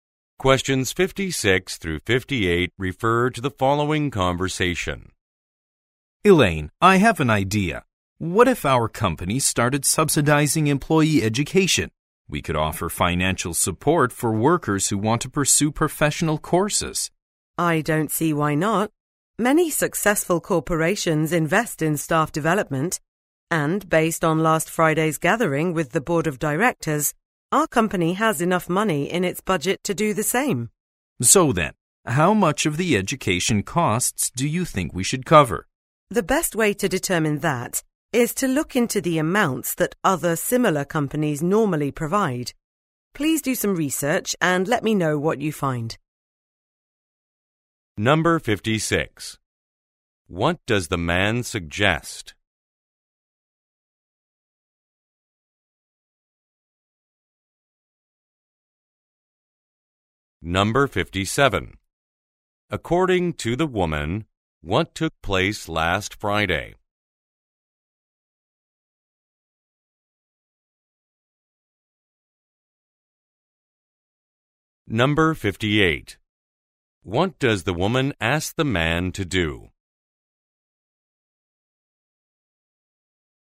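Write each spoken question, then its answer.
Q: What does the man suggest?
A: That the company subsidize employee education

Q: According to the woman, what took place last Friday?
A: A meeting with the board of directors

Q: What does the woman ask the man to do?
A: Research how much similar companies provide for education costs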